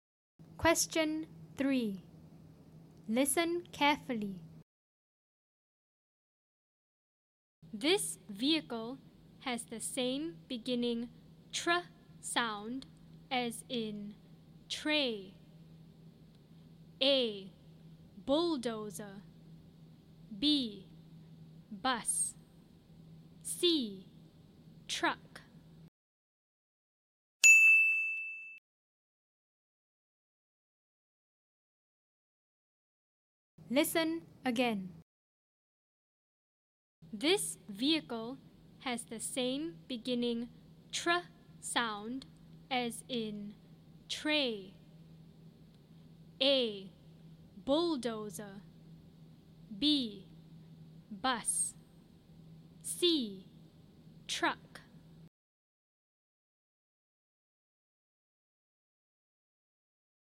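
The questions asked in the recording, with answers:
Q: This vehicle has the same beginning tr sound as in tray.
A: C: Truck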